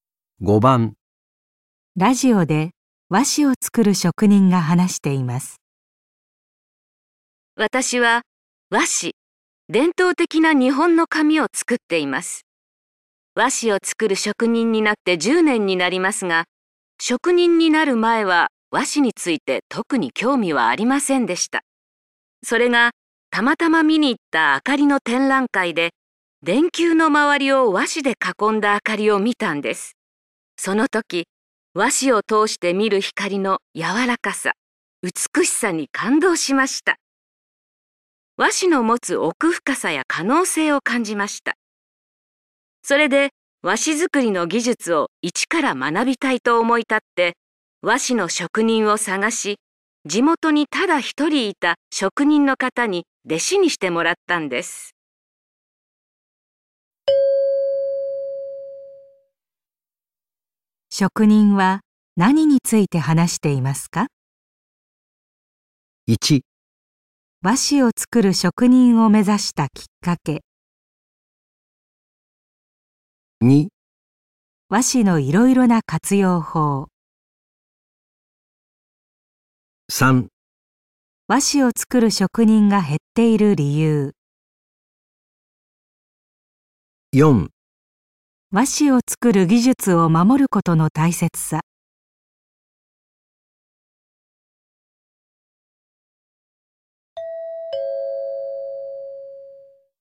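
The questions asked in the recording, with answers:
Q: 職人は何について話していますか?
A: 1: 和紙を作る職人を目指したきっかけ。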